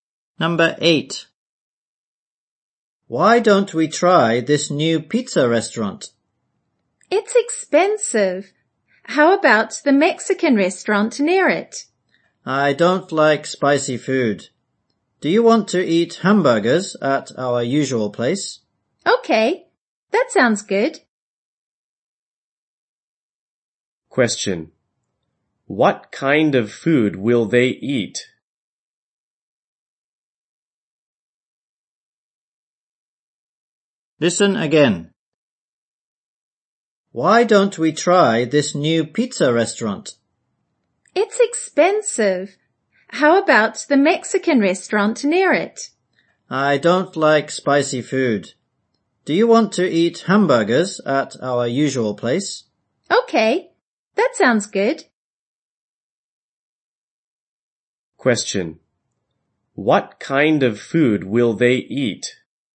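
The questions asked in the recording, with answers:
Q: What kind of food will they eat?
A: Hamburgers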